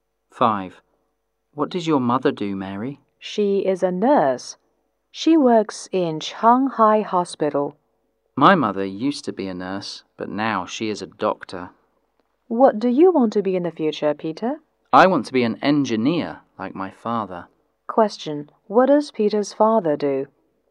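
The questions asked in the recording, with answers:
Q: What does Peter's father do?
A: He is an engineer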